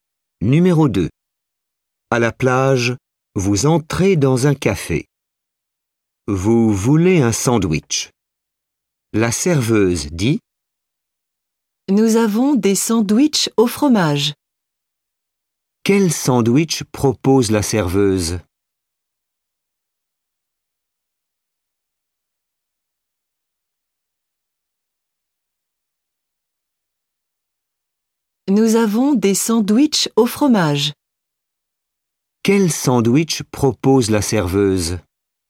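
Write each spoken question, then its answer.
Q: Quel sandwich propose la serveuse?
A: Un sandwich au fromage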